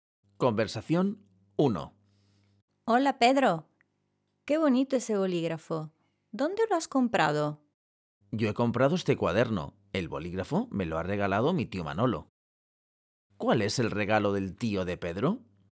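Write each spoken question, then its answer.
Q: ¿Cuál es el regalo del tío de Pedro?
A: un bolígrafo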